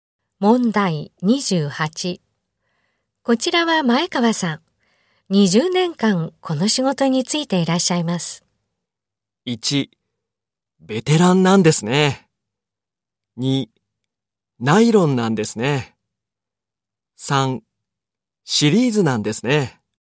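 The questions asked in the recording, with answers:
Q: こちらは前川さん。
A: 1: ベテランなんですね。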